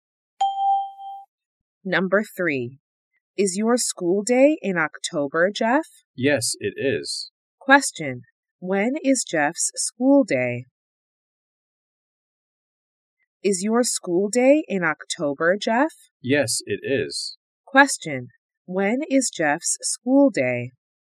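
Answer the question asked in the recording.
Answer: In October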